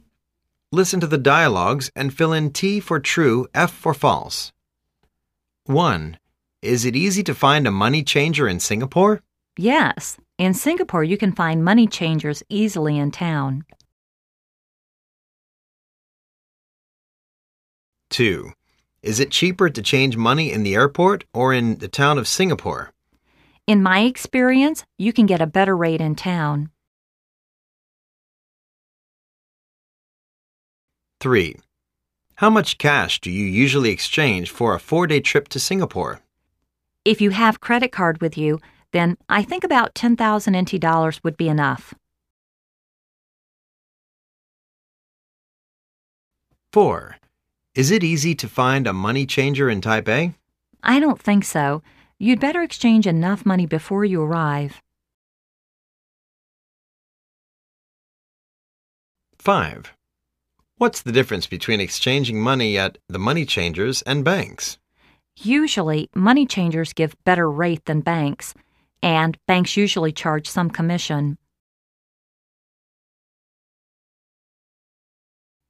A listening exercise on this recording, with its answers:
Listen to the dialogues and fill in T for "True", F for "False".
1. He thinks it's very convenient to exchange money in Singapore.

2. From his experience in Singapore, exchanging money in town is usually cheaper than in the airport.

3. He thinks preparing about 10000 Taiwan dollars for a 4-month trip in Singapore is enough.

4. He thinks it's not convenient to exchange money in Taipei.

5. He thinks exchanging money at banks or money changers are the same.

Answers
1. T
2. T
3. F
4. T
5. F

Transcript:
A:Is it easy to find a money changer in Singapore?
B:Yes.In Singapore you can find money changers easily in town.
A:Is it cheaper to change money in the airport or in the town of Singapore?
B:In my experience, you can get a better rate in town.
A:How much cash do you usually exchange for a 4-day trip to Singapore?
B:If you have credit card with you then I think about 10000 NT dollars would be enough.
B:I don't think so. You'd better exchange enough money before you arrive.
A:What's the difference between exchanging money at the money changers and banks?
B:Usually, money changers give better rate than banks. And, banks usually charge some commission.